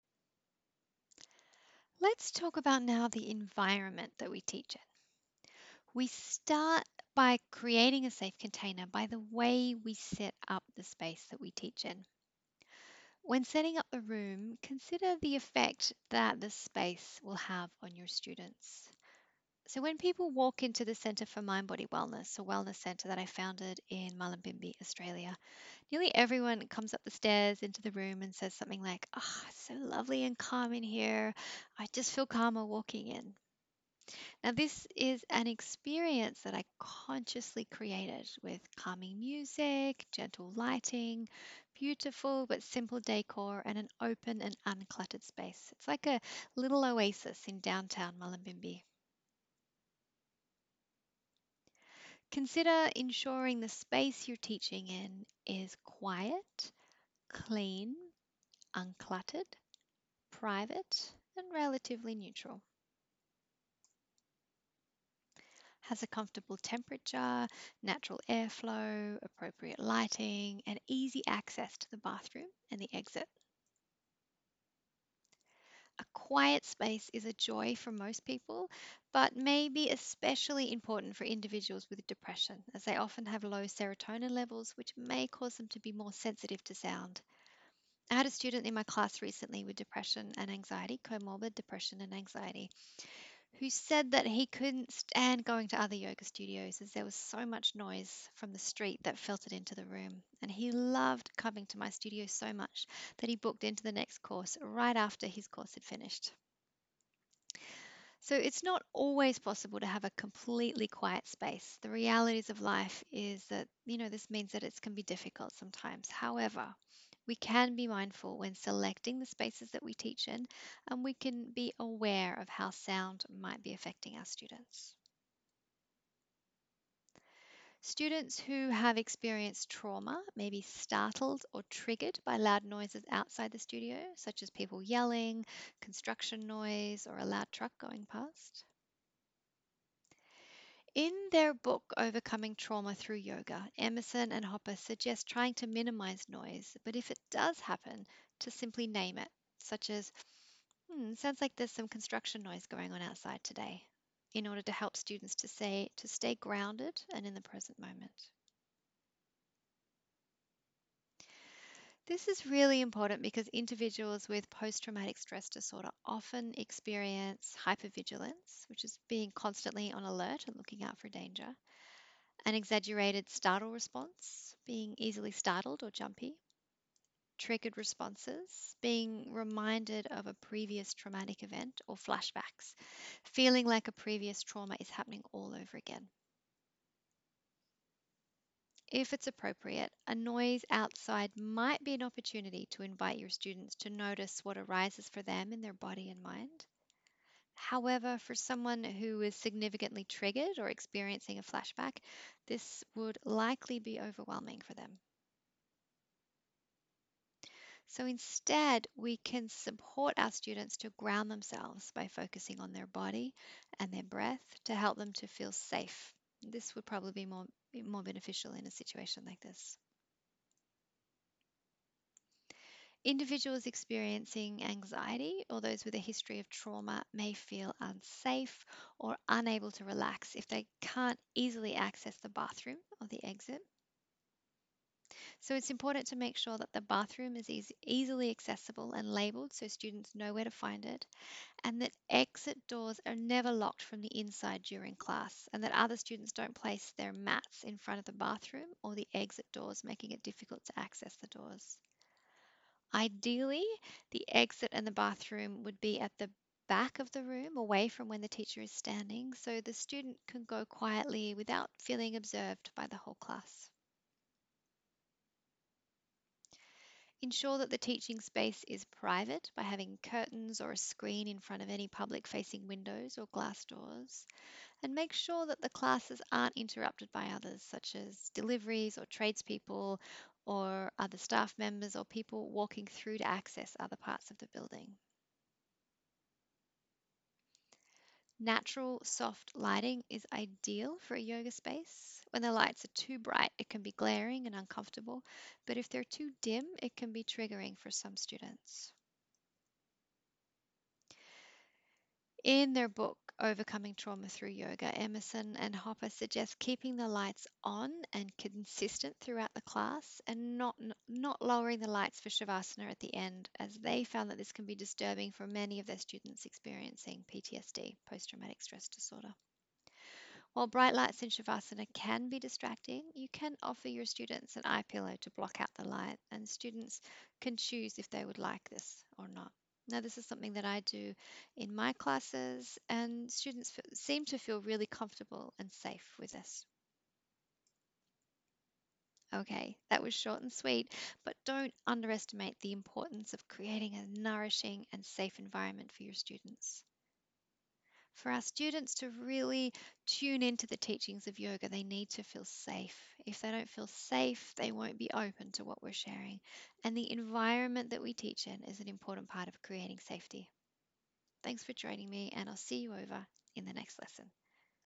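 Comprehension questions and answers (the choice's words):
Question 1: What qualities of the environment are helpful in creating a safe container?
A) Quiet, clean, uncluttered, private and relatively neutral.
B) Comfortable temperature, natural air flow and appropriate lighting.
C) Easy access to the bathroom and exit.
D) All of the above.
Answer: All of the above.

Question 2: Why might a quiet space be especially important for individuals with depression?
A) Because they are likely to be introverted.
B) Because they have low serotonin levels which can cause sensitivity to sound.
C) Because they are generally too sensitive.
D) All of the above.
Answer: Because they have low serotonin levels which can cause sensitivity to sound.

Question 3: Why might a quiet space be especially important for individuals with Posttraumatic Stress Disorder?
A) Because they may be hypervigilant to certain sounds.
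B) Because they may have an exaggerated startle response to loud noises.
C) Because they may experience triggers or flashbacks as a result of a loud noise.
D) All of the above.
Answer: All of the above.

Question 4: Why is it important for students to be able to access the bathroom and exit?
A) Because students with a history of trauma may feel unsafe if they cannot leave if they need to.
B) Because students experiencing anxiety may feel unsafe if they cannot leave if they need to.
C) Because students experiencing anxiety or those with a history of trauma may be unable to relax if they cannot leave if they need to.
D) All of the above.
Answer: All of the above.

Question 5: Why is it important to keep the lights on and consistent throughout the class?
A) Because it saves electricity.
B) Because we need to see that the students are doing all the postures correctly, in precise accordance with our instruction.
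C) Because low lighting could be triggering for a students experiencing Posttraumatic Stress Disorder.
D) All of the above.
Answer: Because low lighting could be triggering for a students experiencing Posttraumatic Stress Disorder.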